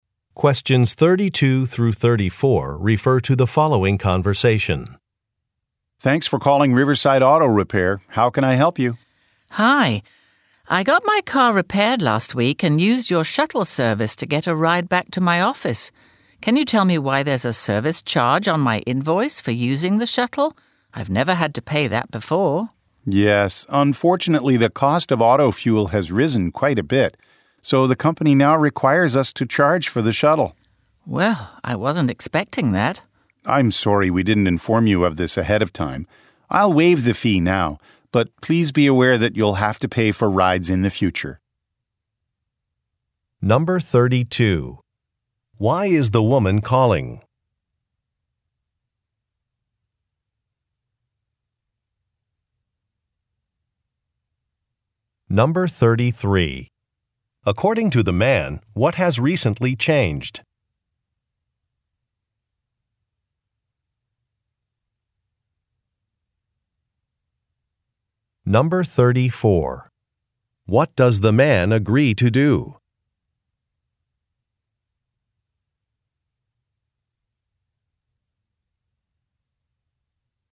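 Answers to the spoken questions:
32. To ask about a shuttle service charge on her invoice
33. The cost of fuel has risen
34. Waive the shuttle fee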